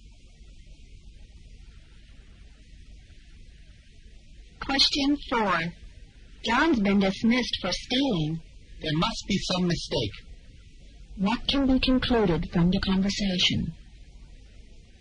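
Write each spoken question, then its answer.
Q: What can be concluded from the conversation?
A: The second speaker doesn't believe John stole anything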